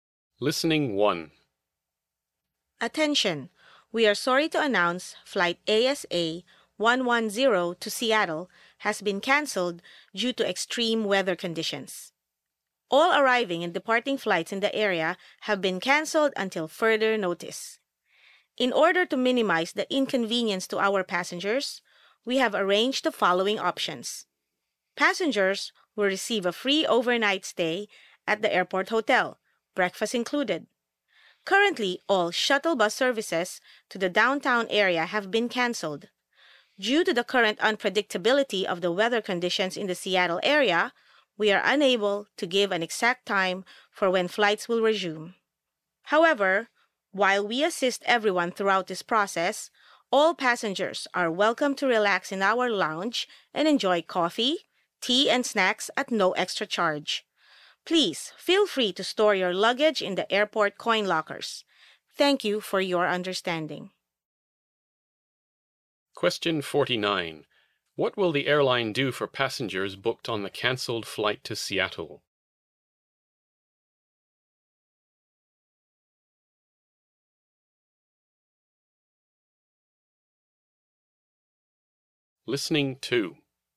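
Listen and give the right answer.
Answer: Give them a free overnight stay at the airport hotel, breakfast included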